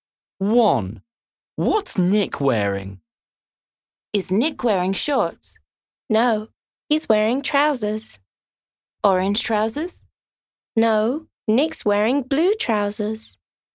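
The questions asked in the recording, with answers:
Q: What's Nick wearing?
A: Blue trousers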